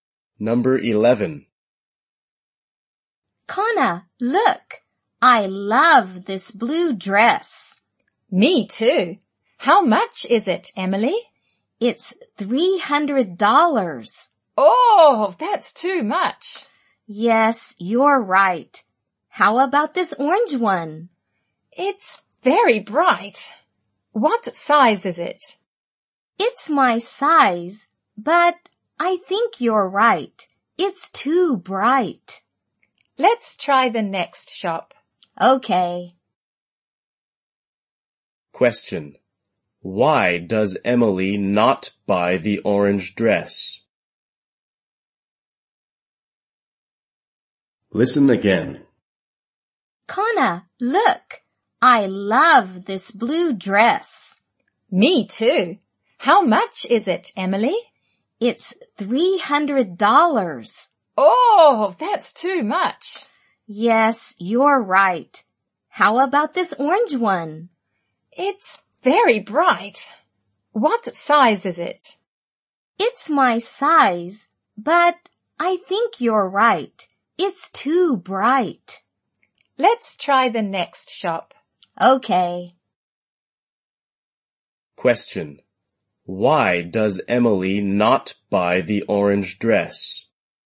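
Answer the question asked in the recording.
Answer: It's too bright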